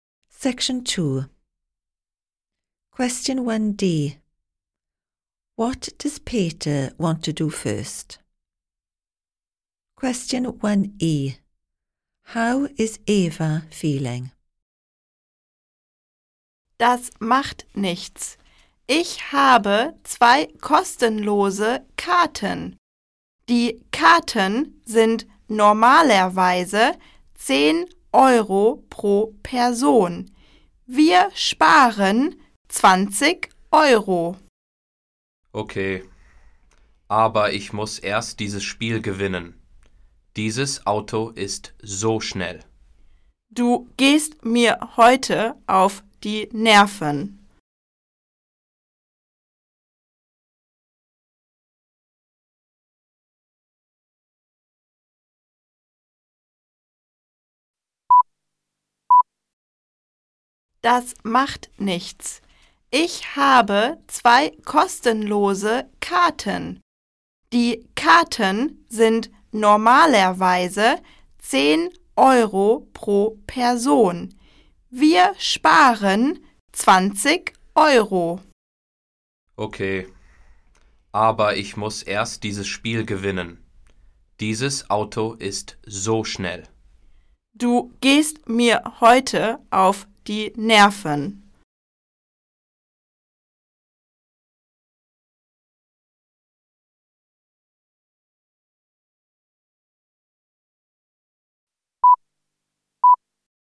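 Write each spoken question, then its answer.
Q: What does Peter want to do first?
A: Win the computer game he is playing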